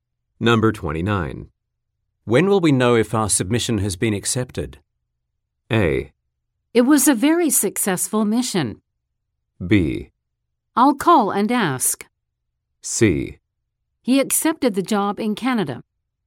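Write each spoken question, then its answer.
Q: When will we know if our submission has been accepted?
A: B: I'll call and ask.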